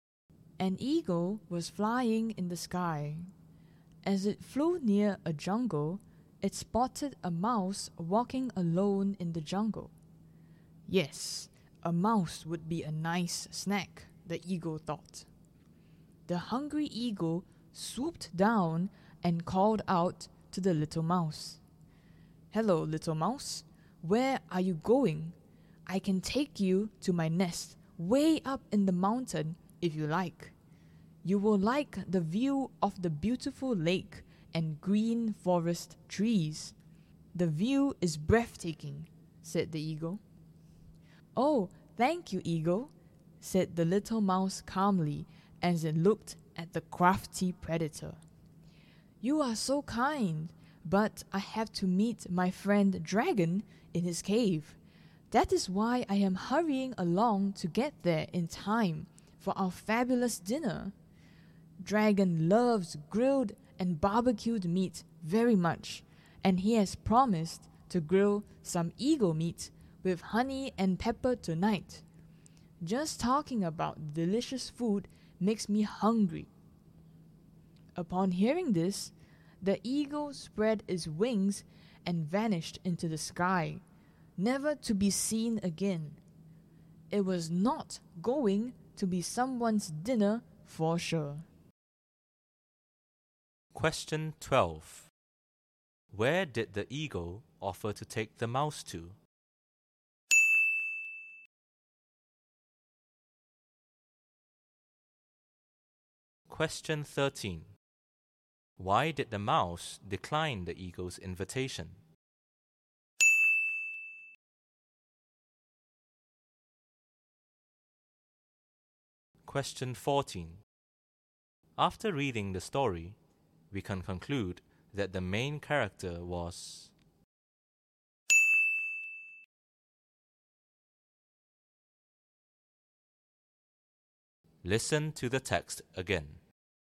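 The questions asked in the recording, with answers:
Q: Where did the eagle offer to take the mouse to?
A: To its nest way up in the mountain

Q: Why did the mouse decline the eagle's invitation?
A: It had to meet its friend Dragon in his cave for dinner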